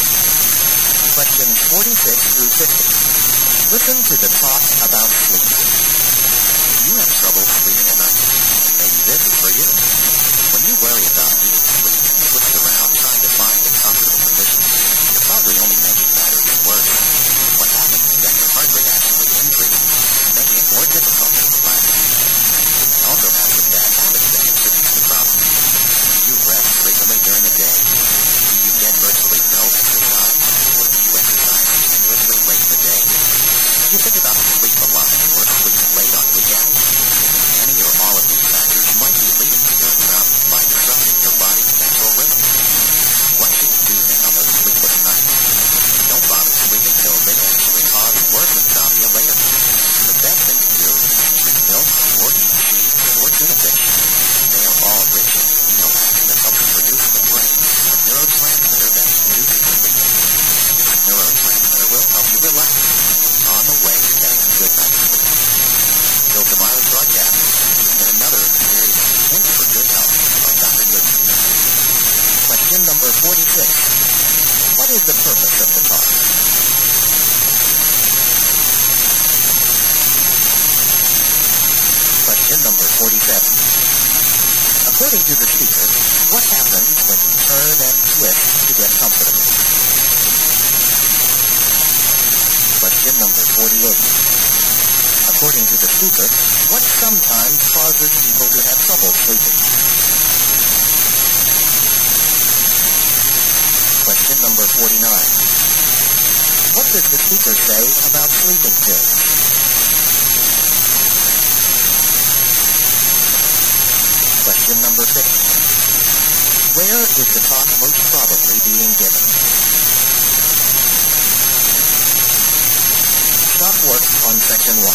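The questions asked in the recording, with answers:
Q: What is the purpose of the talk?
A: To give advice on sleeping better

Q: According to the speaker, what happens when you turn and twist to get comfortable?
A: Your heart rate increases

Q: According to the speaker, what sometimes causes people to have trouble sleeping?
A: Bad habits that disrupt the body's natural rhythm

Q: What does the speaker say about sleeping pills?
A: They can cause worse insomnia later

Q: Where is the talk most probably being given?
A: On a radio health broadcast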